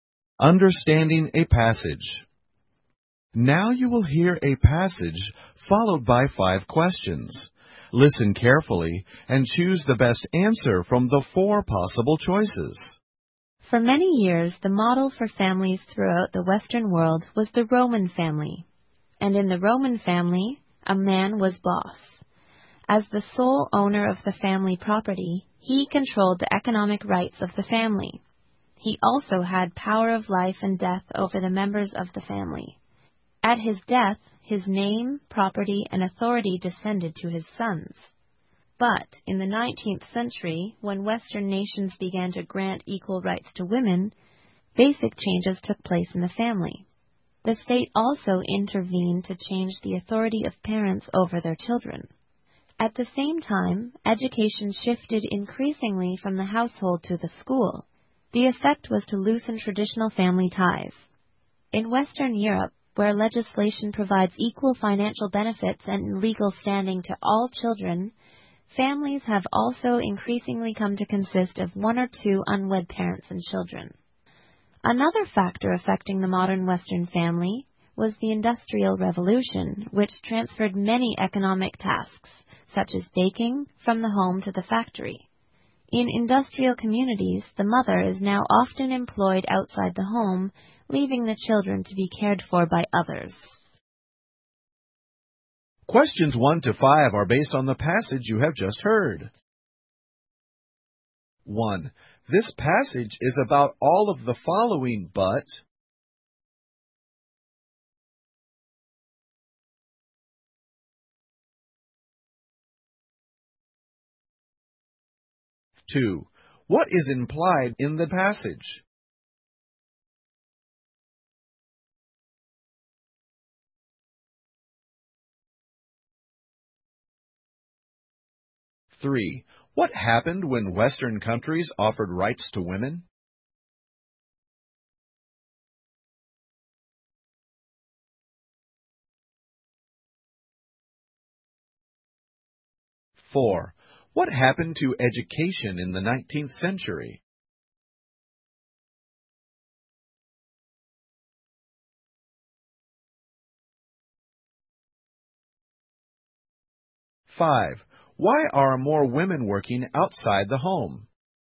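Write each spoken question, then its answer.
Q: What happened when Western countries offered rights to women?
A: Basic changes took place in the family

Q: What happened to education in the 19th century?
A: It shifted increasingly from the household to the school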